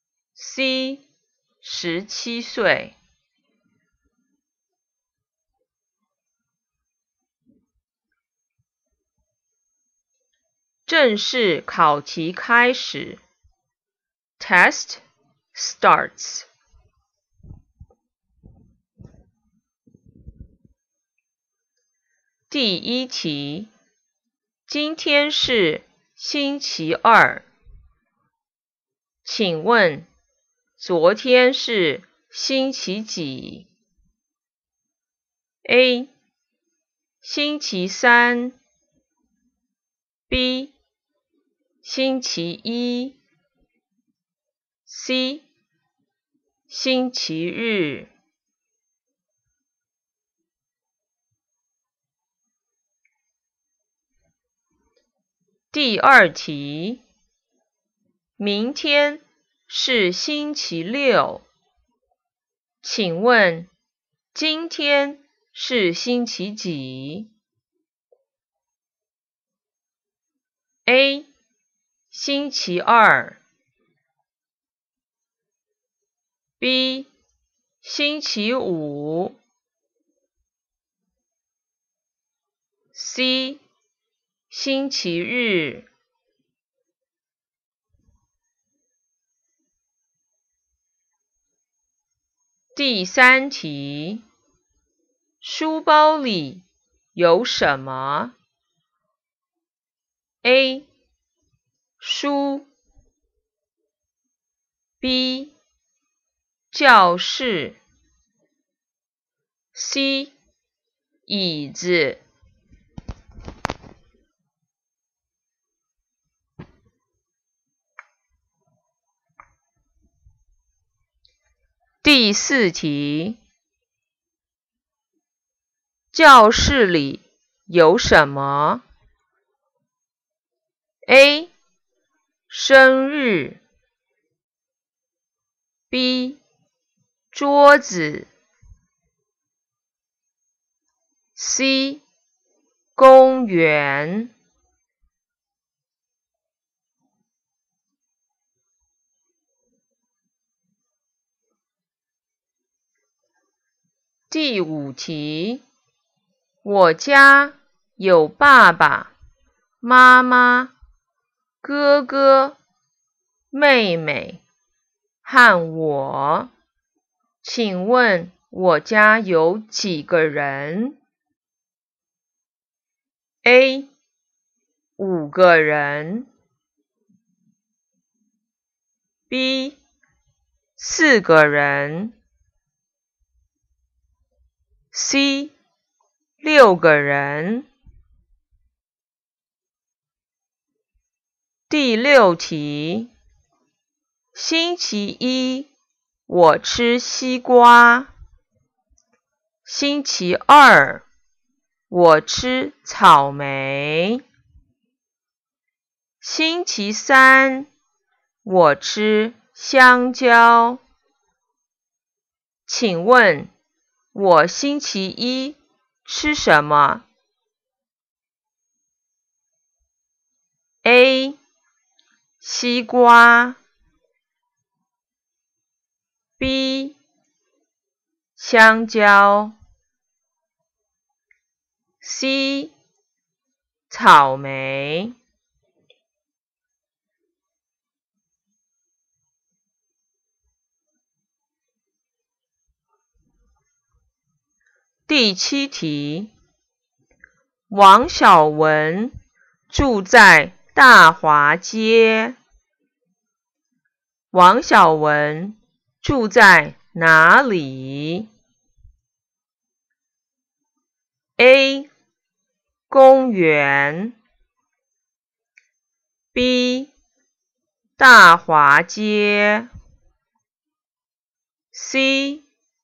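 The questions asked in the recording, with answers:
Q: 今天是星期二 请问 昨天是星期几?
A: B: 星期一

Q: 明天是星期六 请问今天是星期几?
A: B: 星期五

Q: 书包里有什么?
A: A: 书

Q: 教室里有什么?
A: B: 桌子

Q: 请问我家有几个人?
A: A: 五个人

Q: 请问我星期一吃什么?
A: A: 西瓜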